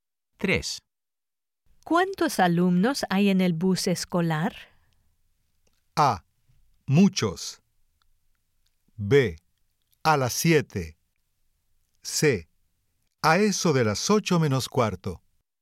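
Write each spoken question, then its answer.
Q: ¿Cuántos alumnos hay en el bus escolar?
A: A: Muchos.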